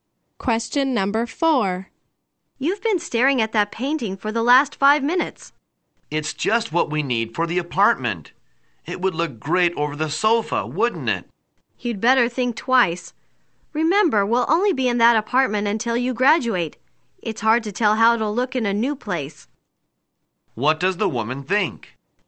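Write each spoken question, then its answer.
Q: What does the woman think?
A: They should not buy the painting without thinking more about it.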